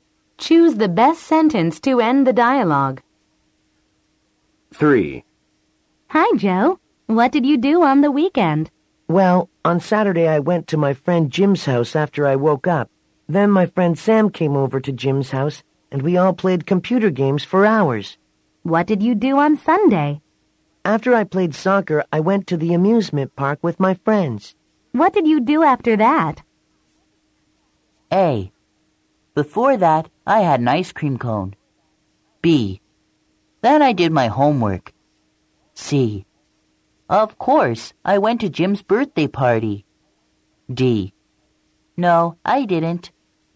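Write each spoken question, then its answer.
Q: What did you do after that?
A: B: Then I did my homework.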